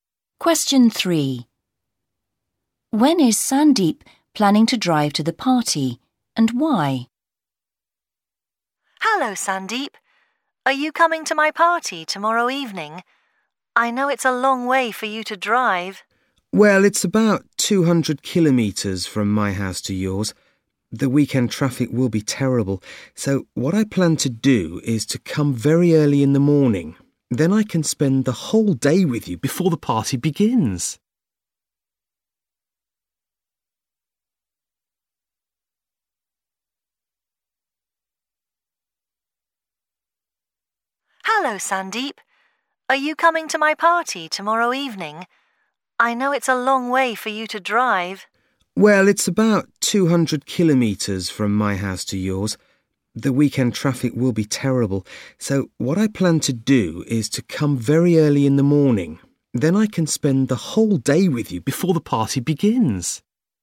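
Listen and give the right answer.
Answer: Very early in the morning, to avoid the terrible weekend traffic and spend the day with his friend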